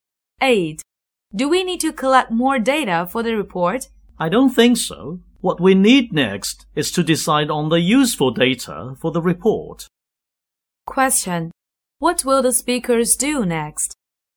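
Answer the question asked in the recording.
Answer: Decide which data are useful for the report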